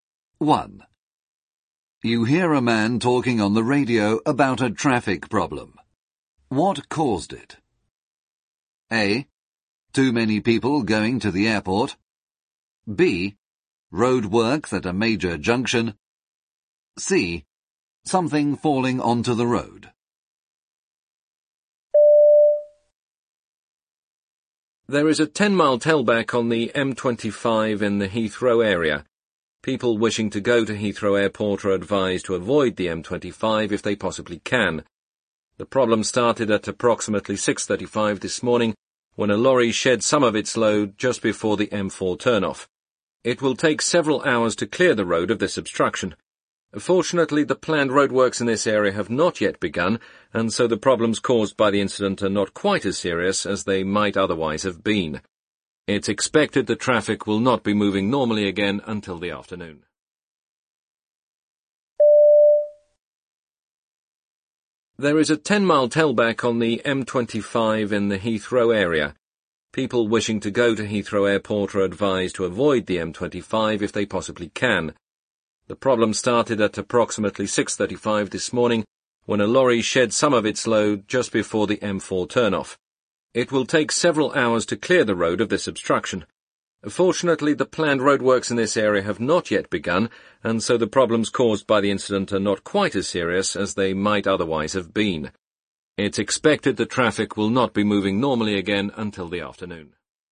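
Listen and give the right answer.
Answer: C: Something falling onto the road.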